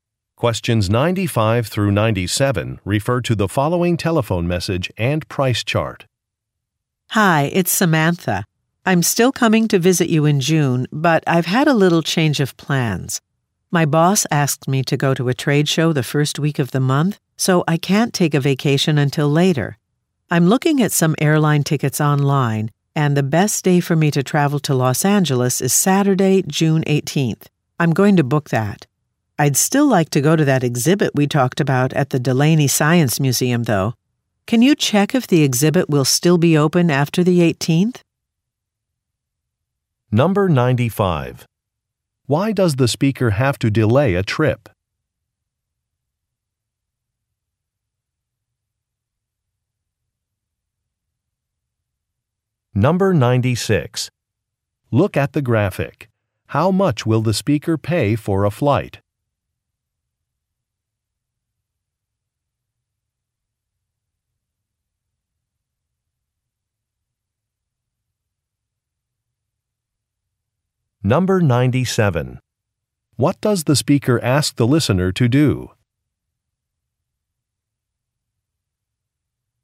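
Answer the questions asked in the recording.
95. She has to go to a trade show
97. Check if the museum exhibit will be open after the 18th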